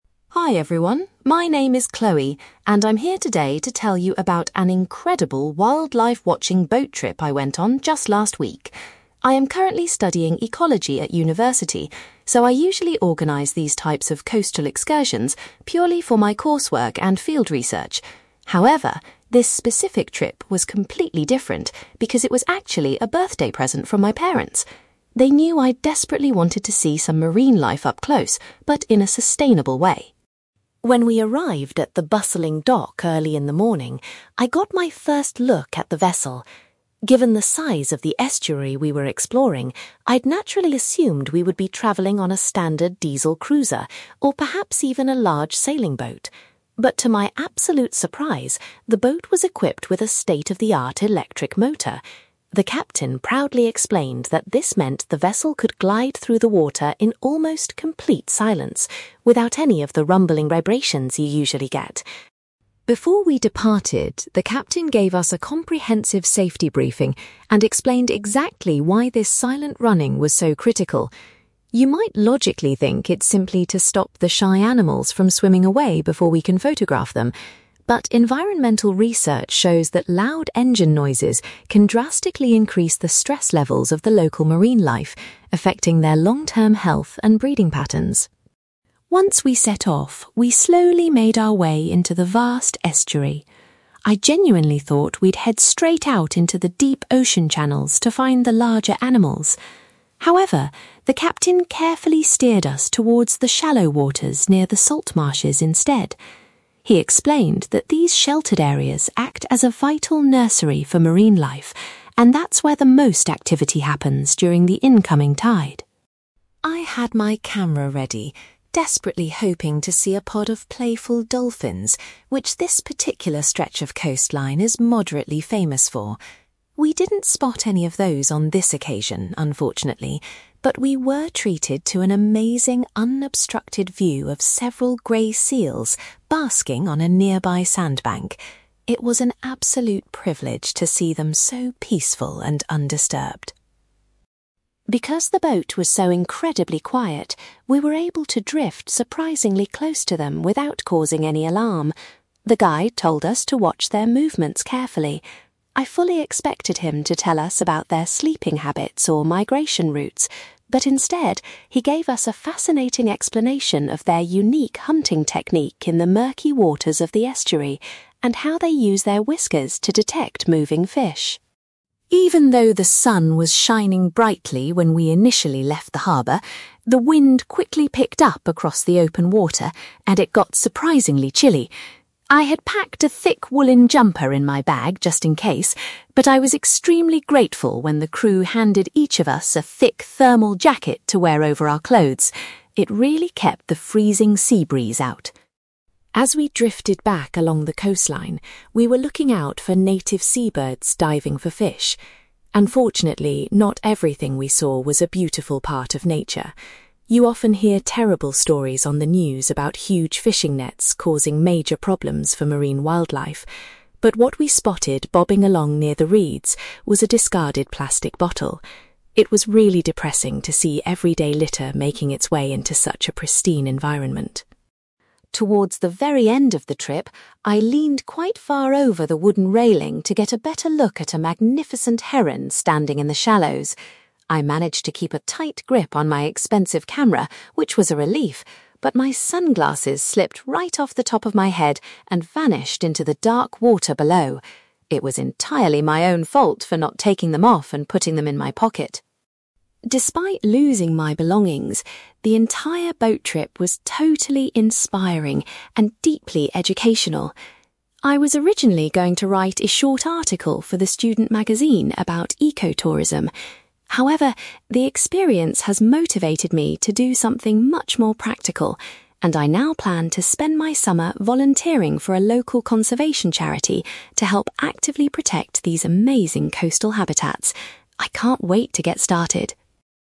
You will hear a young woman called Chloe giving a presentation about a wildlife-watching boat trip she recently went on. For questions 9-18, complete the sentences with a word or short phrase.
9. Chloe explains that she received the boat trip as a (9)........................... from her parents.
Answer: birthday present

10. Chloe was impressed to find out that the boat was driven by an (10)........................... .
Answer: electric motor

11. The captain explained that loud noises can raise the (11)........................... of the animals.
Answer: stress levels

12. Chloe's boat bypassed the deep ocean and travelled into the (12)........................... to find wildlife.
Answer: shallow waters

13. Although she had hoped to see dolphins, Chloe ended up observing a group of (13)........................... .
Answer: grey seals

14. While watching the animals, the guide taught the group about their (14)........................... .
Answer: hunting technique

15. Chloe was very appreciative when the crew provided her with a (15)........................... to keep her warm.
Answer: thermal jacket

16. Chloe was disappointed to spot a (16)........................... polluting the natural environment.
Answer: plastic bottle

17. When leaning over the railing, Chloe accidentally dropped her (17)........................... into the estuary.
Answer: sunglasses

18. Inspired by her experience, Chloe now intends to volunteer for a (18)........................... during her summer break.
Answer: conservation charity

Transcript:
Chloe: Hi everyone, my name is Chloe, and I'm here today to tell you about an incredible wildlife-watching boat trip I went on just last week. I am currently studying ecology at university, so I usually organise these types of coastal excursions purely for my coursework and field research. However, this specific trip was completely different because it was actually a birthday present from my parents. They knew I desperately wanted to see some marine life up close, but in a sustainable way.
When we arrived at the bustling dock early in the morning, I got my first look at the vessel. Given the size of the estuary we were exploring, I'd naturally assumed we would be travelling on a standard diesel cruiser, or perhaps even a large sailing boat. But to my absolute surprise, the boat was equipped with a state-of-the-art electric motor. The captain proudly explained that this meant the vessel could glide through the water in almost complete silence, without any of the rumbling vibrations you usually get.
Before we departed, the captain gave us a comprehensive safety briefing and explained exactly why this silent running was so critical. You might logically think it's simply to stop the shy animals from swimming away before we can photograph them. But environmental research shows that loud engine noises can drastically increase the stress levels of the local marine life, affecting their long-term health and breeding patterns.
Once we set off, we slowly made our way into the vast estuary. I genuinely thought we'd head straight out into the deep ocean channels to find the larger animals. However, the captain carefully steered us towards the shallow waters near the salt marshes instead. He explained that these sheltered areas act as a vital nursery for marine life, and that's where the most activity happens during the incoming tide.
I had my camera ready, desperately hoping to see a pod of playful dolphins, which this particular stretch of coastline is moderately famous for. We didn't spot any of those on this occasion, unfortunately, but we were treated to an amazing, unobstructed view of several grey seals basking on a nearby sandbank. It was an absolute privilege to see them so peaceful and undisturbed.
Because the boat was so incredibly quiet, we were able to drift surprisingly close to them without causing any alarm. The guide told us to watch their movements carefully. I fully expected him to tell us about their sleeping habits or migration routes, but instead, he gave us a fascinating explanation of their unique hunting technique in the murky waters of the estuary, and how they use their whiskers to detect moving fish.
Even though the sun was shining brightly when we initially left the harbour, the wind quickly picked up across the open water and it got surprisingly chilly. I had packed a thick woollen jumper in my bag just in case, but I was extremely grateful when the crew handed each of us a thick thermal jacket to wear over our clothes. It really kept the freezing sea breeze out.
As we drifted back along the coastline, we were looking out for native seabirds diving for fish. Unfortunately, not everything we saw was a beautiful part of nature. You often hear terrible stories on the news about huge fishing nets causing major problems for marine wildlife. But what we spotted bobbing along near the reeds was a discarded plastic bottle. It was really depressing to see everyday litter making its way into such a pristine environment.
Towards the very end of the trip, I leaned quite far over the wooden railing to get a better look at a magnificent heron standing in the shallows. I managed to keep a tight grip on my expensive camera, which was a relief, but my sunglasses slipped right off the top of my head and vanished into the dark water below! It was entirely my own fault for not taking them off and putting them in my pocket.
Despite losing my belongings, the entire boat trip was totally inspiring and deeply educational. I was originally going to write a short article for the student magazine about eco-tourism. However, the experience has motivated me to do something much more practical, and I now plan to spend my summer volunteering for a local conservation charity to help actively protect these amazing coastal habitats. I can't wait to get started!

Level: B2